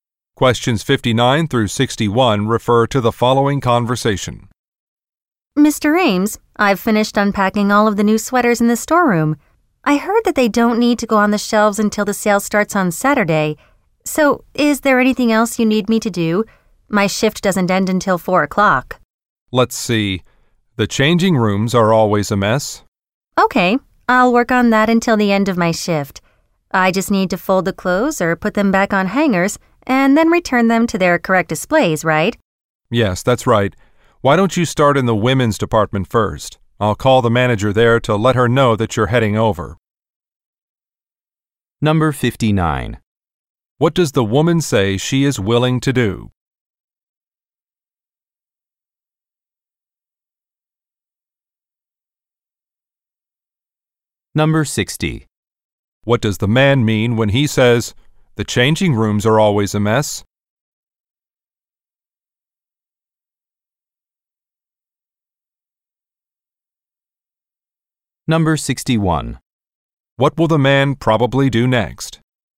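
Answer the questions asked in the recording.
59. Do more work until her shift ends
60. He wants her to tidy the changing rooms
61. Call the women's department manager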